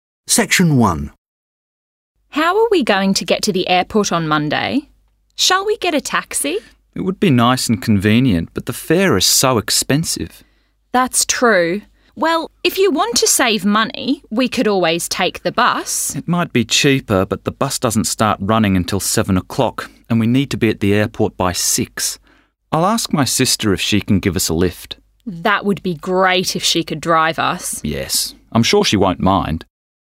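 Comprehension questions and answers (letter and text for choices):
Listen and answer the questions in 3.1.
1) The speakers decide to travel to the airport by:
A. Taxi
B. Bus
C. Car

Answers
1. C. Car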